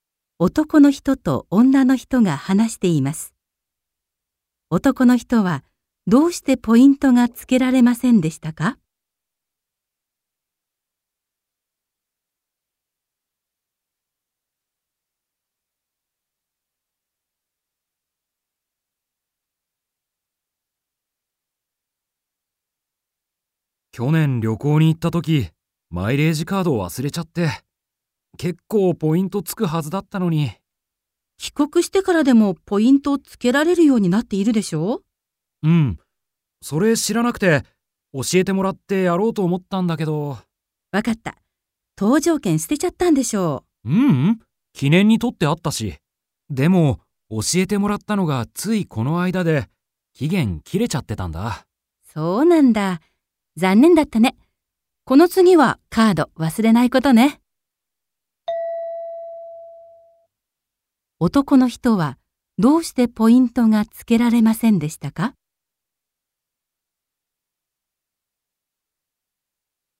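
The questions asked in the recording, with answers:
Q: 男の人はどうしてポイントがつけられませんでしたか?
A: 知った時には期限が切れていたから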